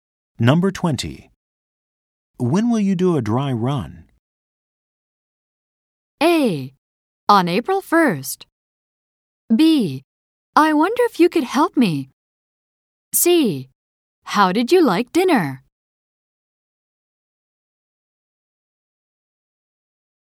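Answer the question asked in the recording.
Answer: A: On April 1st.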